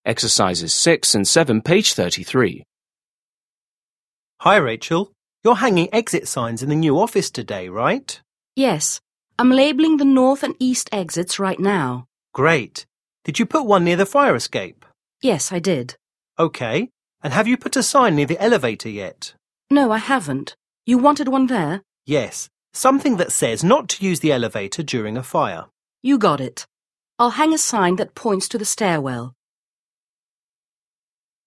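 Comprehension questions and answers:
6. Listen to a conversation between an office manager and a construction worker. Mark the following statements as true (T) or false (F).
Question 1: The woman is hanging signs at multiple exits.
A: T

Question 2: The building does not have a fire escape.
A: F

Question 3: The man wants a sign directing people to the elevator.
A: F

7. Listen again and complete the conversation.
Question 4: Manager: Hi Rachel. You're hanging exit signs in the 1_______________today right?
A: new office

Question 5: Worker: Yes. I'm labeling the north and east 2______________right now.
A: exits

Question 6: Manager: Great! Did you put one near the 3_______ ?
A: fire escape

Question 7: Worker: Yes,4_________ _.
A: I did

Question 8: Manager: Okay. And have you put a sign near the elevator 5_____________ ?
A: yet

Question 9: Worker: No. 6________. You wanted one there?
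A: I haven't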